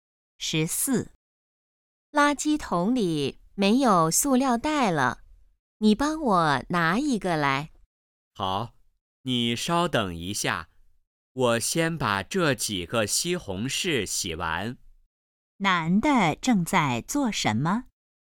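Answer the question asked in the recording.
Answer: 洗西红柿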